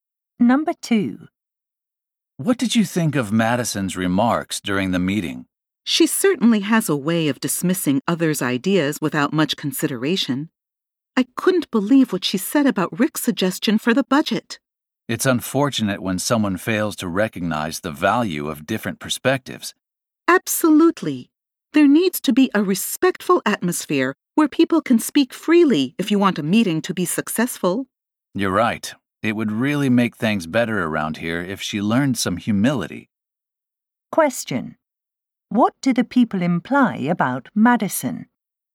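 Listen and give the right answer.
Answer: She dismisses others' ideas and should learn some humility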